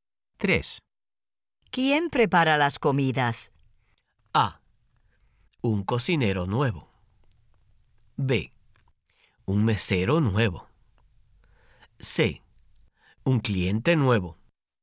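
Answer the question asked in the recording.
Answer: A: Un cocinero nuevo.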